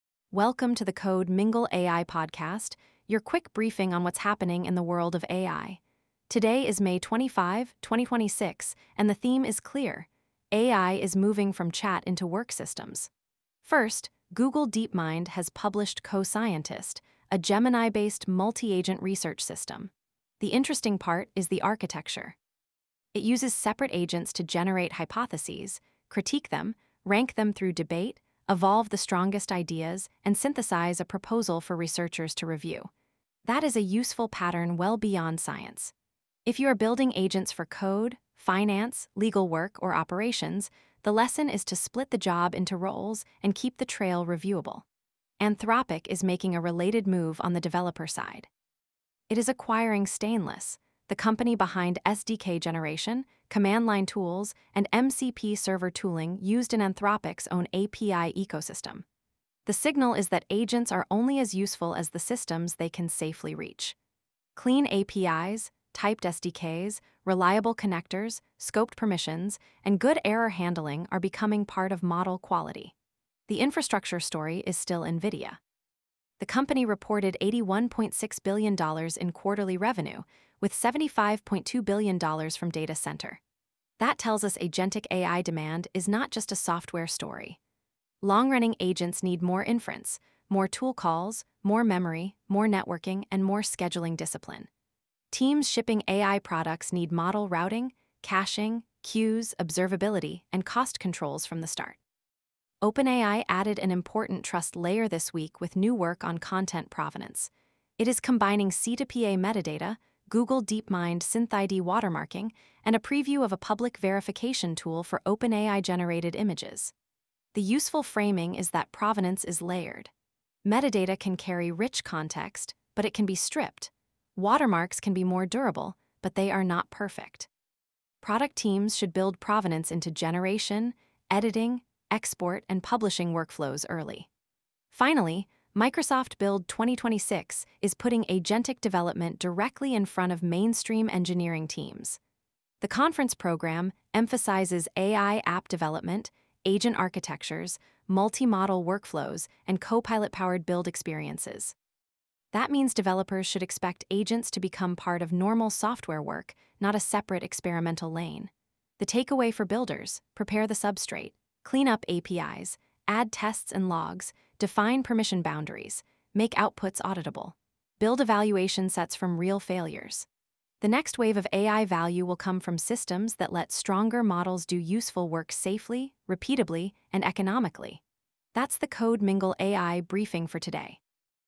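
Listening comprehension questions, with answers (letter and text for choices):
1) What is the main architectural lesson from Google DeepMind's Co-Scientist announcement?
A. Serious agents should use explicit roles such as generation, critique, ranking, and synthesis.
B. Scientific AI no longer needs human review.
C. A single chatbot prompt is the best design for research workflows.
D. Multi-agent systems only apply to biology.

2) Why is Anthropic's Stainless acquisition important for agentic AI?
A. It removes the need for APIs.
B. It shows that SDKs, CLIs, and MCP servers are part of how agents safely connect to real systems.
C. It is mainly a consumer chatbot branding change.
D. It means Claude will only support one programming language.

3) What did NVIDIA's May 20 earnings report signal for AI product teams?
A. AI infrastructure demand has collapsed.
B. Agent workloads can be planned without cost controls.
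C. AI infrastructure demand remains intense, so routing, caching, queues, and model budgets matter.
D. Data-center revenue is unrelated to software architecture.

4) Why did OpenAI describe provenance as a layered system?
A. Because C2PA metadata and watermarking solve different failure modes.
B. Because metadata can never be removed.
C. Because watermarking is always perfectly accurate.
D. Because provenance only matters for social networks.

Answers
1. A. Serious agents should use explicit roles such as generation, critique, ranking, and synthesis.
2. B. It shows that SDKs, CLIs, and MCP servers are part of how agents safely connect to real systems.
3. C. AI infrastructure demand remains intense, so routing, caching, queues, and model budgets matter.
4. A. Because C2PA metadata and watermarking solve different failure modes.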